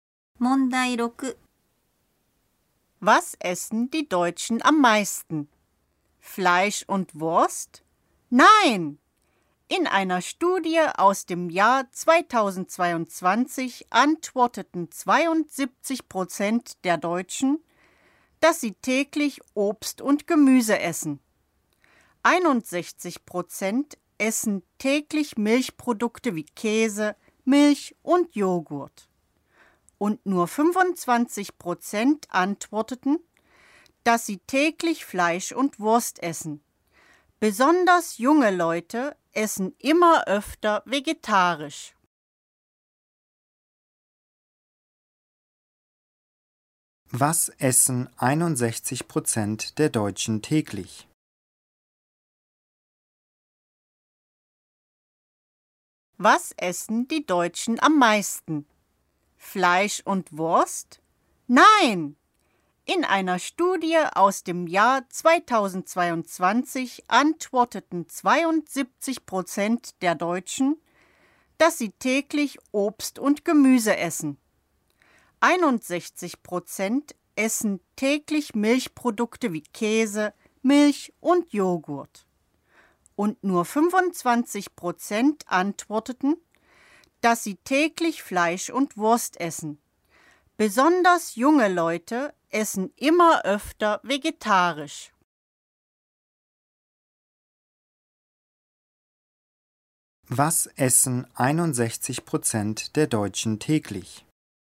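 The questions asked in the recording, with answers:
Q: Was essen 61% der Deutschen täglich?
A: Milchprodukte wie Käse, Milch und Joghurt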